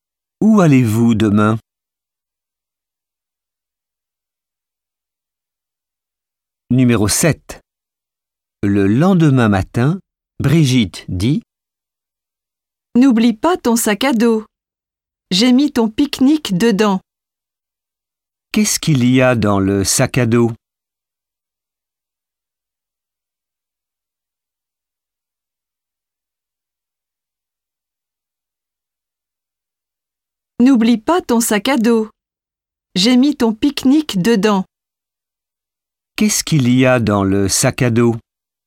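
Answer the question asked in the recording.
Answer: Le pique-nique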